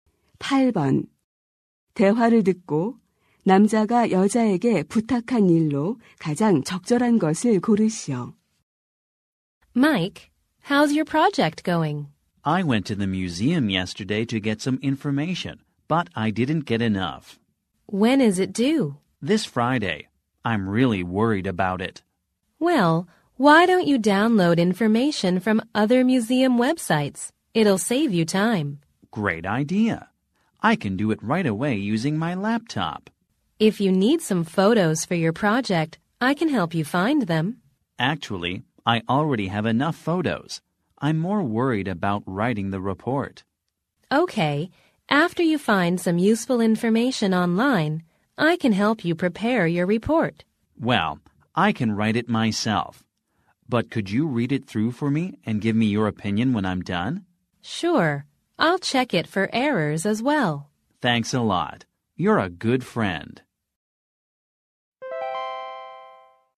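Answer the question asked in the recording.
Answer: 보고서를 읽고 의견 주기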